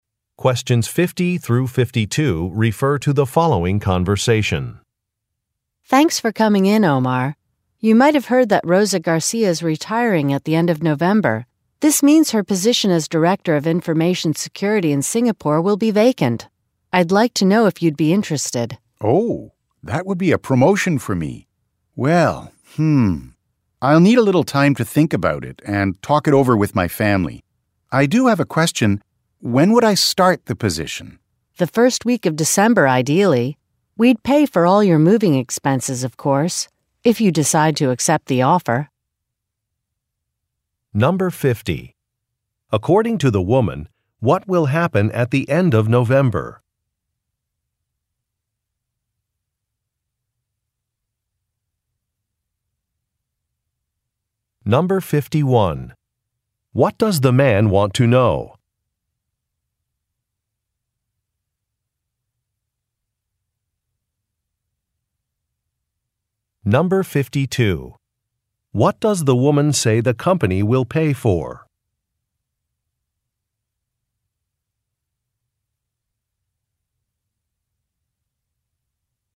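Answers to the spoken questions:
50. Rosa Garcia will retire
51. When he would start the position
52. His moving expenses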